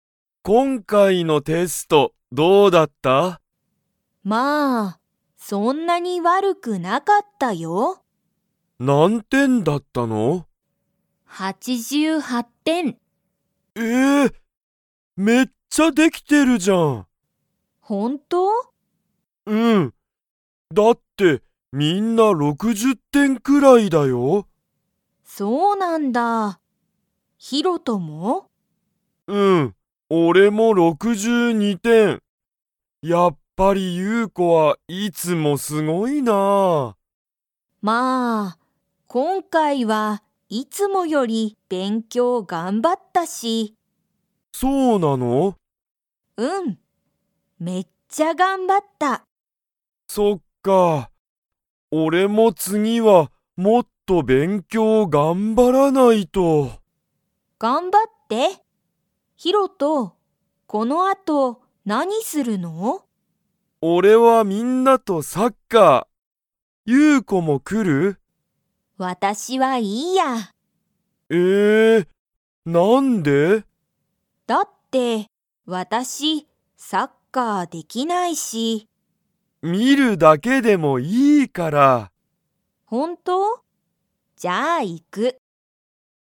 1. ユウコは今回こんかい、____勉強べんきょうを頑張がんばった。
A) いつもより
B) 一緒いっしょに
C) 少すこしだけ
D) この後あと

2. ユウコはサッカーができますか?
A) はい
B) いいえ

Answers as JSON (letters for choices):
{"1": "A", "2": "B"}

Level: Level 2